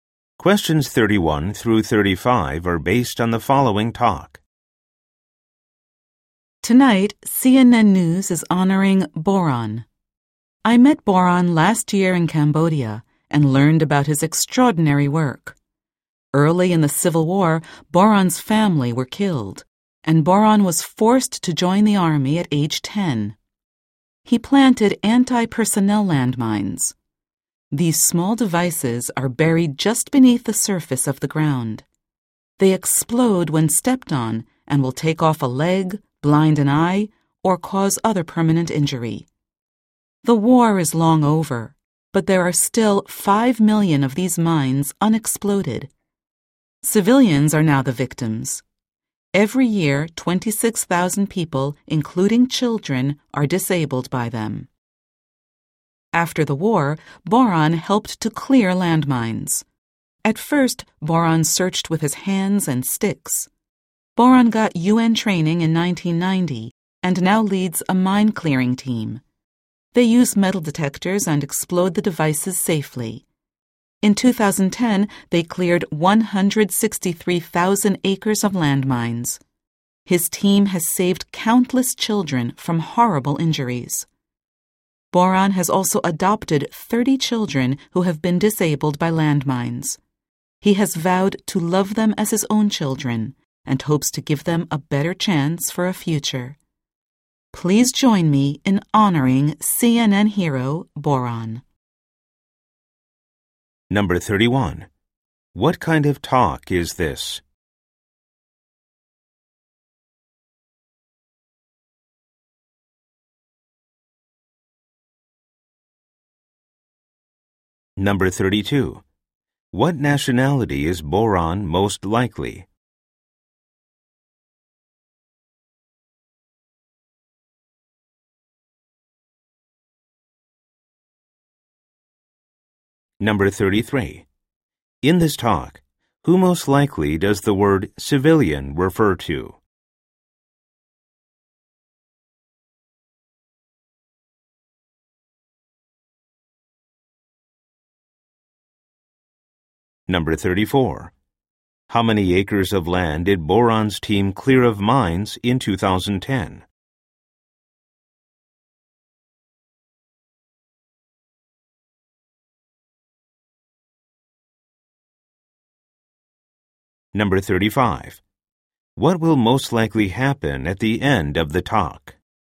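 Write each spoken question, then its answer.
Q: What kind of talk is this?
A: A news program honoring a hero

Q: What nationality is Boron most likely?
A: Cambodian

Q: In this talk, who most likely does the word civilian refer to?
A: Ordinary people who are not soldiers

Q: How many acres of land did Boron's team clear of mines in 2010?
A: 163,000 acres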